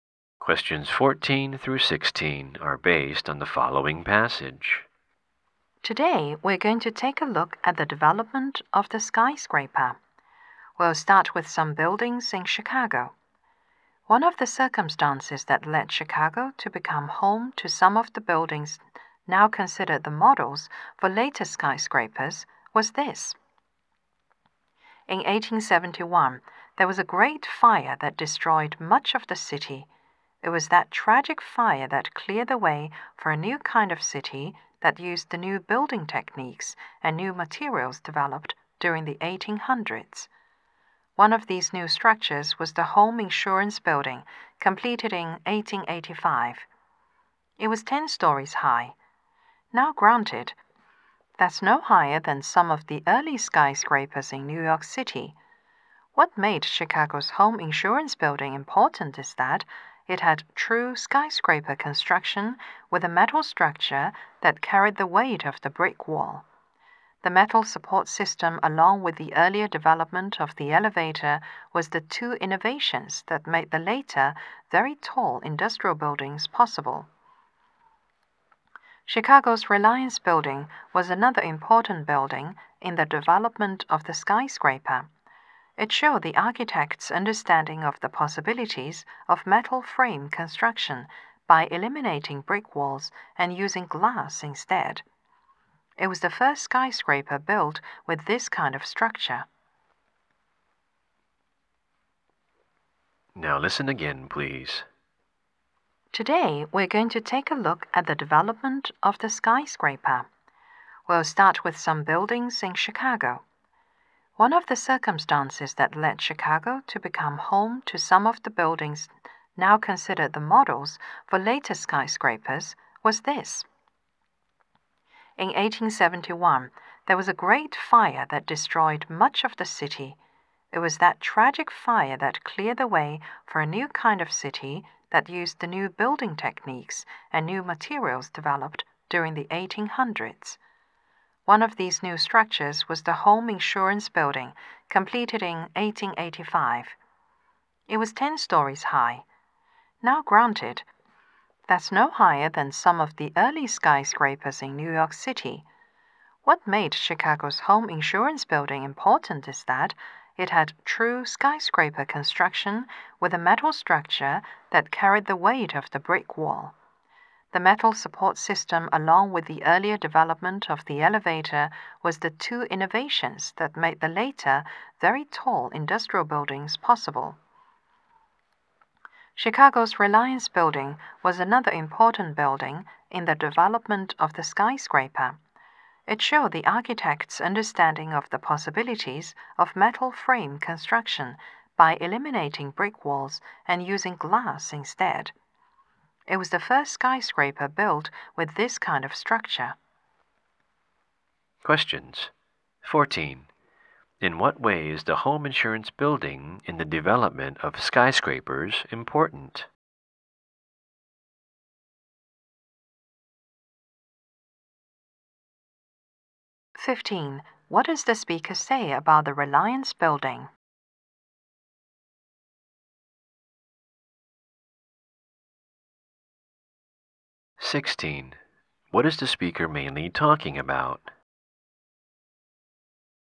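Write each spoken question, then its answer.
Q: In what way is the Home Insurance Building in the development of skyscrapers important?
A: It had a metal structure carrying the weight of the walls

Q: What does the speaker say about the Reliance Building?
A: It was the first skyscraper to use glass instead of brick walls

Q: What is the speaker mainly talking about?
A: The development of the skyscraper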